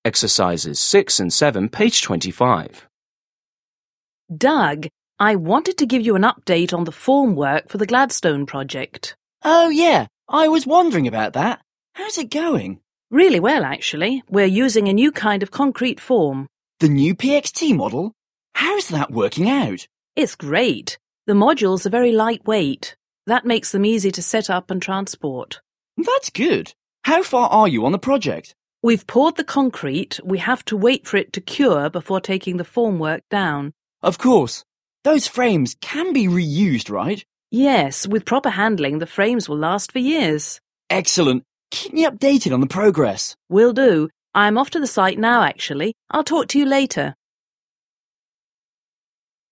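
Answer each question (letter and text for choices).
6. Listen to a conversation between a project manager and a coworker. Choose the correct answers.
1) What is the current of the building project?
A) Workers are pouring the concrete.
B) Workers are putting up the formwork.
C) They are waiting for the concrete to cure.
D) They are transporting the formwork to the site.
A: C) They are waiting for the concrete to cure.

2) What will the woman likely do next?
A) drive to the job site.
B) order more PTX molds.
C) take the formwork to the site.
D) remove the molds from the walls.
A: A) drive to the job site.

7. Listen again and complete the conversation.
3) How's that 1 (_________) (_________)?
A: working out

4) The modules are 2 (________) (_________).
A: very lightweight

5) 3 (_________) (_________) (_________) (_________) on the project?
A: How far are you

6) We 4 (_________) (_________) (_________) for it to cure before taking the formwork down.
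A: have to wait

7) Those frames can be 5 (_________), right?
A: reused

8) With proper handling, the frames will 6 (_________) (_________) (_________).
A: last for years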